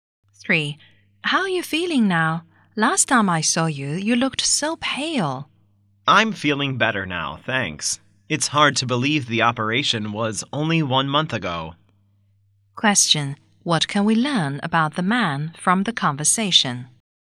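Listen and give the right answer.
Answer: He had an operation a month ago and is recovering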